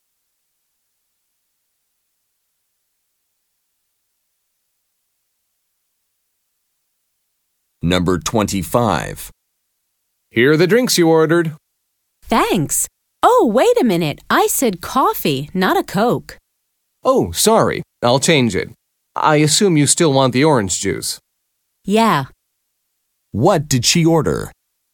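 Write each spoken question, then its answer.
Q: What did she order?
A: Coffee and orange juice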